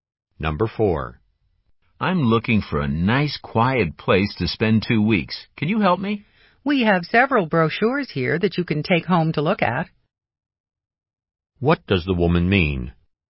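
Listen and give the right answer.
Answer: The man can take brochures home to choose a place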